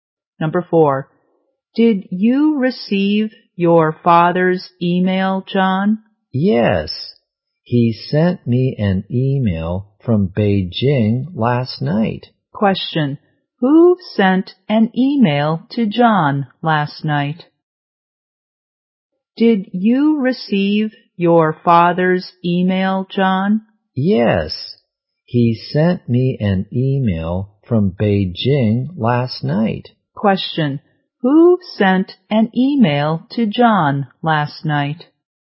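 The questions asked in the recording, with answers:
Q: Who sent an email to John last night?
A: His father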